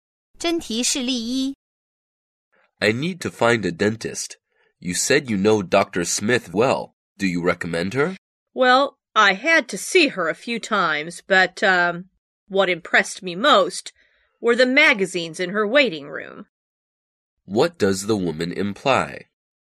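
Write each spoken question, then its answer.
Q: What does the woman imply?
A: She isn't impressed with Dr. Smith's dental work; only the magazines were good.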